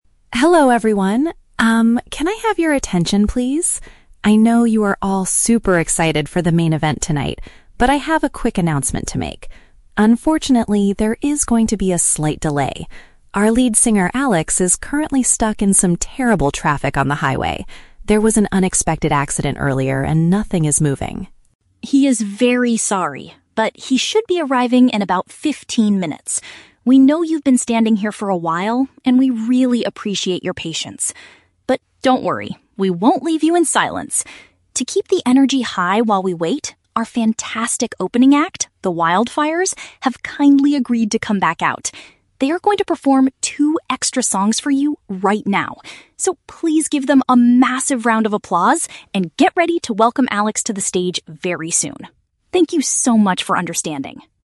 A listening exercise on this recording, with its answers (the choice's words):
Listen to a stage announcement at a music festival and choose the correct answer (A, B, or C) for each question.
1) Why is the main performance delayed?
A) The sound engineers need more time to fix the stage speakers.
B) The lead vocalist was injured in a sudden car crash.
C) The main performer is caught in severe road congestion.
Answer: The main performer is caught in severe road congestion.

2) How much longer does the audience have to wait for Alex?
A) A quarter of an hour.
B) About thirty minutes.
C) For an unknown amount of time.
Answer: A quarter of an hour.

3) What will happen while the audience is waiting?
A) The event staff will play some background music to avoid silence.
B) The first band will return to play a few more pieces of music.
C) The audience will be allowed to buy food and drinks at a discount.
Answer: The first band will return to play a few more pieces of music.

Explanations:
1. The speaker announces that the lead singer (Alex) is "stuck in some terrible traffic." Option (C) perfectly paraphrases this ("main performer" = lead singer, "severe road congestion" = terrible traffic). Option (B) is a trap; an "accident" is mentioned as the cause of the traffic, but Alex was not injured in it. Option (A) is a plausible reason for a delay, but it is not mentioned.
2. The speaker says Alex should be arriving in "about fifteen minutes." Option (A) uses a mathematical synonym ("a quarter of an hour" = 15 minutes). Option (C) is a trap; the delay is somewhat uncertain ("about"), but they do give a spe

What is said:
Event Representative: Hello, everyone! Um, can I have your attention, please? I know you are all super excited for the main event tonight, but I have a quick announcement to make. Unfortunately, there is going to be a slight delay. Our lead singer, Alex, is currently stuck in some terrible traffic on the highway. There was an unexpected accident earlier, and nothing is moving.
He is very sorry, but he should be arriving in about fifteen minutes. We know you've been standing here for a while, and we really appreciate your patience. But don't worry, we won't leave you in silence! To keep the energy high while we wait, our fantastic opening act, The Wildfires, have kindly agreed to come back out. They are going to perform two extra songs for you right now. So, please give them a massive round of applause, and get ready to welcome Alex to the stage very soon. Thank you so much for understanding!